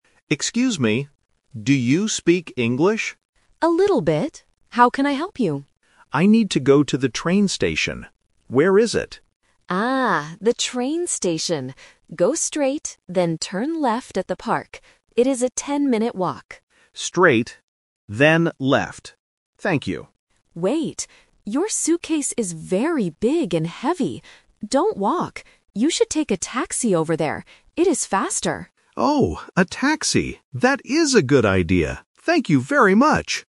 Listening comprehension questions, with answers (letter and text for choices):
Listen to the conversation between a tourist and a local person. Choose the correct answer (A, B, or C) for each question.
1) Where does the tourist want to go?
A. To the park.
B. To the train station.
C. To the airport.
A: B. To the train station.

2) How will the tourist travel there in the end?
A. By taxi.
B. On foot (walking).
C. By bus.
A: A. By taxi.

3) Why shouldn't the tourist walk?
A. Because he doesn't know the way.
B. Because he has a heavy bag.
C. Because it is raining.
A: B. Because he has a heavy bag.

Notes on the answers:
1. The tourist clearly says, "I need to go to the train station." Why the traps are wrong: Option (A) is a trap because the local mentions "the park" when giving directions, but it is not the final destination. Option (C) is a plausible place for a tourist to go, but it is never mentioned in the audio.
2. At the end, the local tells him to "take a taxi," and the tourist agrees, saying, "That is a good idea." Why the traps are wrong: Option (B) is the "Twist" trap. The local first says it is a "ten-minute walk," but then changes his mind and tells the tourist not to walk. Option (C) is not mentioned.
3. The local changes the plan and says, "Your suitcase is very big and heavy. Don't walk." (Suitcase = bag). Why the traps are wrong: Options (A) and (C) are common reasons why people take taxis instead of walking, but they are not the reason given in this conversation.

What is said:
Tourist: Excuse me... do you speak English?
Local: A little bit. How can I help you?
Tourist: I need to go to the train station. Where is it?
Local: Ah, the train station. Go straight, then turn left at the park. It is a ten-minute walk.
Tourist: Straight, then left. Thank you.
Local: Wait! Your suitcase is very big and heavy. Don't walk. You should take a taxi over there. It is faster.